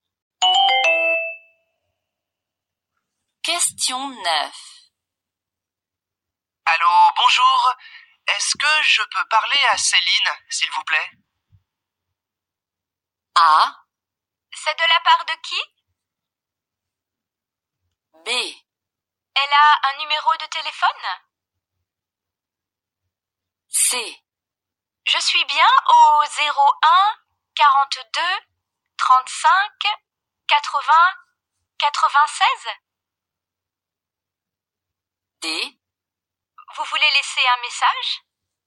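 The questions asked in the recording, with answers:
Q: Allô, bonjour. Est-ce que je peux parler à Céline, s'il vous plaît?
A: A: C'est de la part de qui?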